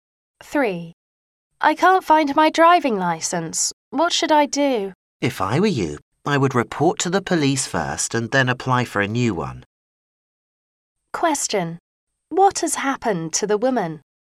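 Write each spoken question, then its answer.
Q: What has happened to the woman?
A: She has lost her driving license.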